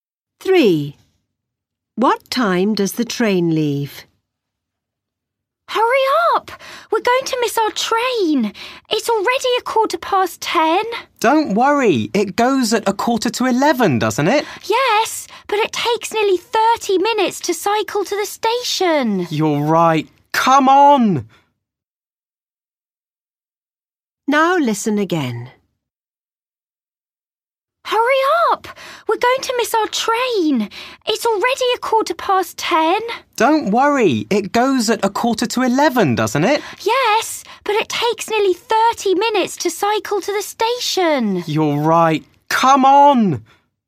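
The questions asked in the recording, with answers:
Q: What time does the train leave?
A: 10:45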